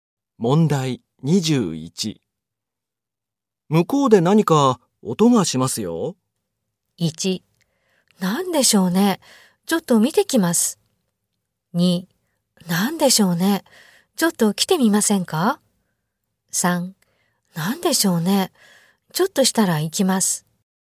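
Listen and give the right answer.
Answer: 1: 何でしょうね。ちょっと見てきます。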